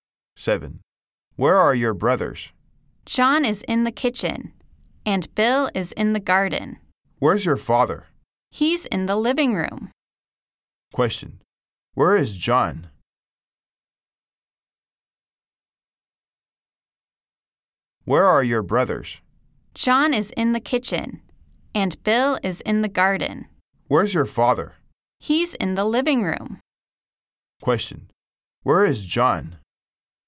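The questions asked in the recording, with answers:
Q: Where is John?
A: In the kitchen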